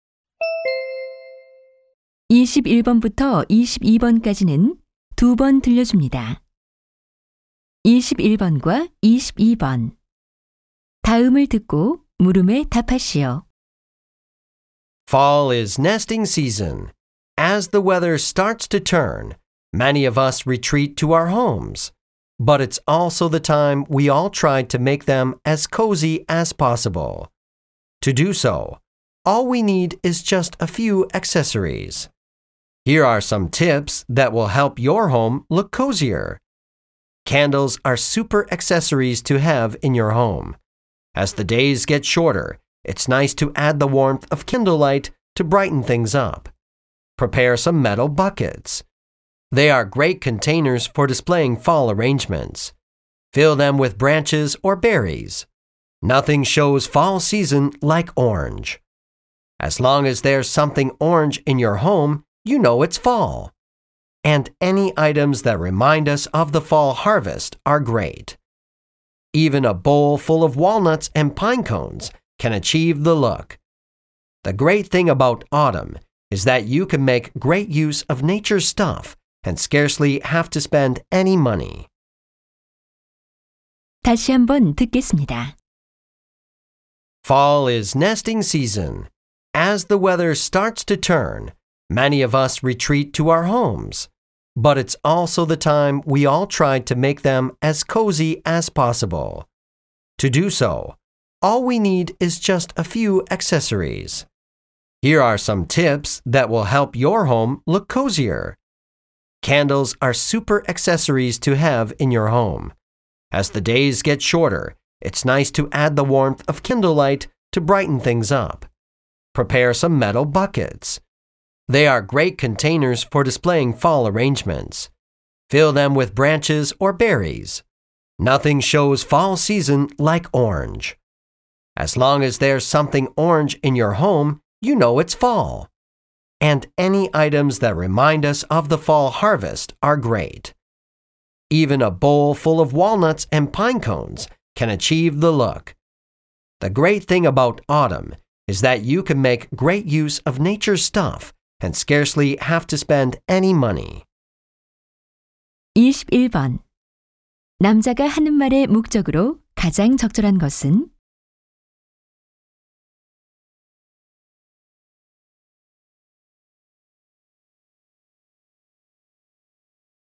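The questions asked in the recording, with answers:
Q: 남자가 하는 말의 목적으로 가장 적절한 것은?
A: 가을에 집을 아늑하게 꾸미는 방법을 알려 주려고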